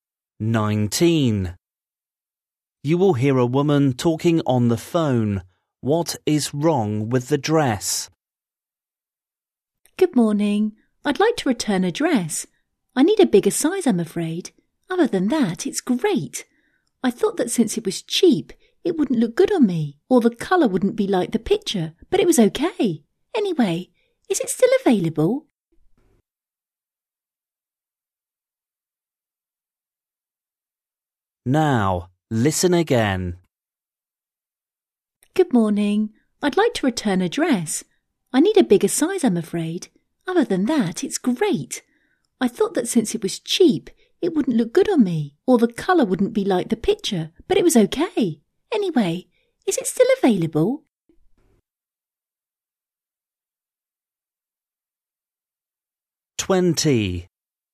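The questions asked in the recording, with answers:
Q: What is wrong with the dress?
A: it is too small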